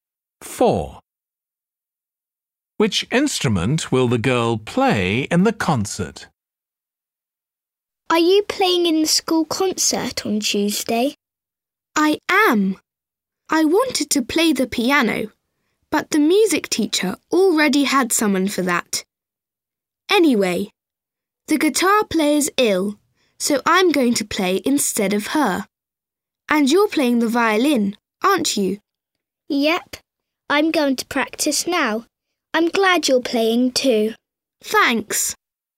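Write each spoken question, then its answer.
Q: Which instrument will the girl play in the concert?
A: the guitar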